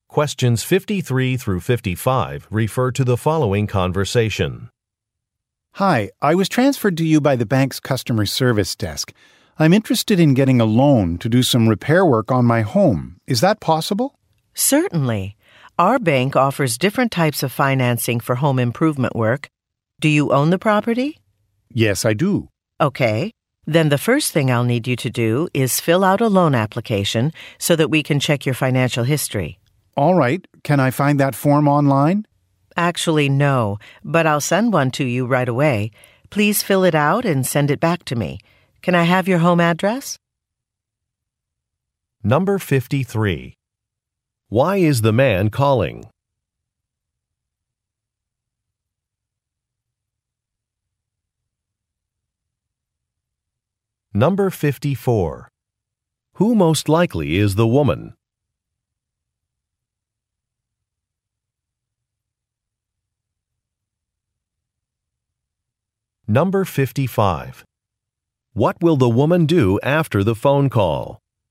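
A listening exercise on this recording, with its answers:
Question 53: Why is the man calling?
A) To open a bank account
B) To complain about repair work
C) To ask about a loan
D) To interview for a job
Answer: C) To ask about a loan

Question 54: Who most likely is the woman?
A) A building inspector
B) A city official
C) An interior designer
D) A bank employee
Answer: D) A bank employee

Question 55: What will the woman do after the phone call?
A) Sign a contract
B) Speak to a manager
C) Meet with a customer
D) Mail a form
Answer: D) Mail a form

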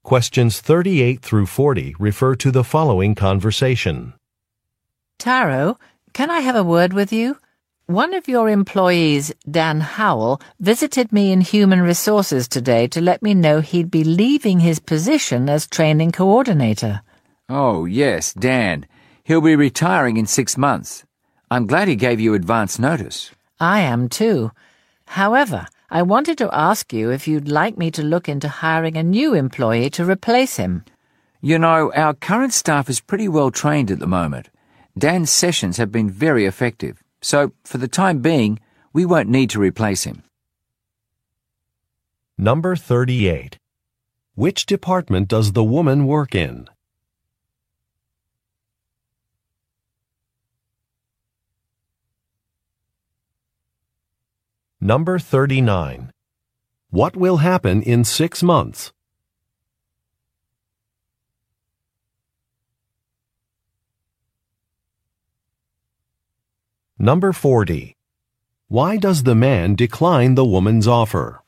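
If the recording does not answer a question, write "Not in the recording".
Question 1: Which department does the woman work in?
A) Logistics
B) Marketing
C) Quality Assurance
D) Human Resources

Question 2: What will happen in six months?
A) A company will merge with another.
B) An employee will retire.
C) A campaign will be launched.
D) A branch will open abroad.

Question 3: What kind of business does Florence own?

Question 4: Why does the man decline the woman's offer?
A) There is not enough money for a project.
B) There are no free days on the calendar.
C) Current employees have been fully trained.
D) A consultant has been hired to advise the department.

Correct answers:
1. D) Human Resources
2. B) An employee will retire.
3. Not in the recording
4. C) Current employees have been fully trained.

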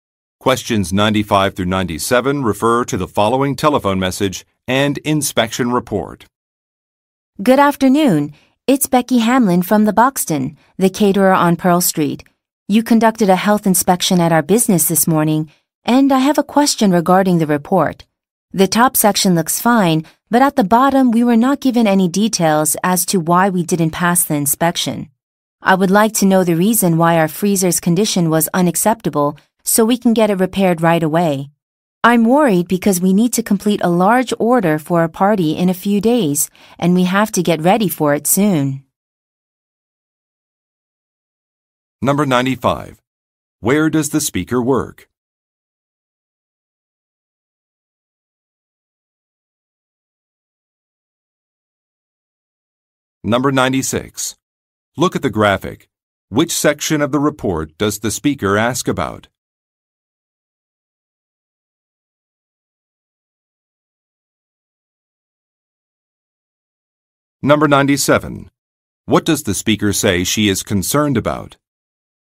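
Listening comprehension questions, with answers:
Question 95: Where does the speaker work?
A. At a flower shop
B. At an appliance store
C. At a catering business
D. At a delivery company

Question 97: What does the speaker say she is concerned about?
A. Fulfilling an order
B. Losing merchandise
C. Hiring more workers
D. Paying a penalty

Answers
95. C. At a catering business
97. A. Fulfilling an order

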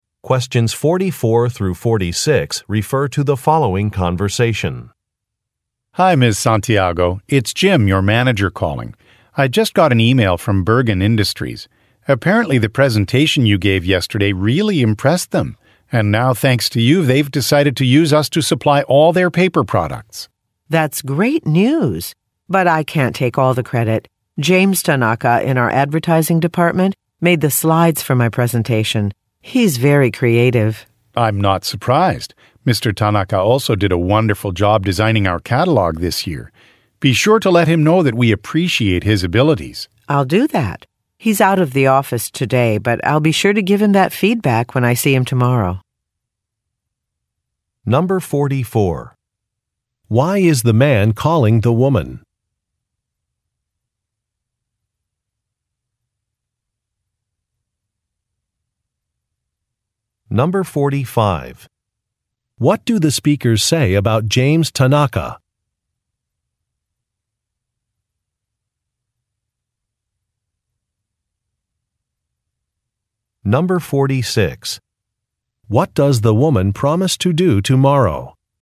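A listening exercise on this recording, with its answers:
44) Why is the man calling the woman?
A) To congratulate her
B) To apologize to her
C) To set up an interview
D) To organize a client visit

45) What do the speakers say about James Tanaka?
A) He has worked overseas.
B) He is very talented.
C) He is familiar with the company policies.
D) He is easy to work with.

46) What does the woman promise to do tomorrow?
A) Revise some documents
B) E-mail some customers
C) Create a training course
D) Give feedback to a colleague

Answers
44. A) To congratulate her
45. B) He is very talented.
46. D) Give feedback to a colleague

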